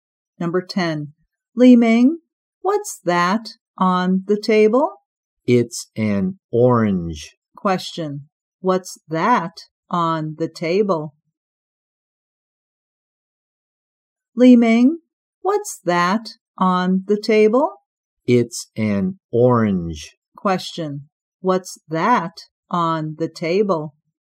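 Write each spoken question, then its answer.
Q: What's that on the table?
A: An orange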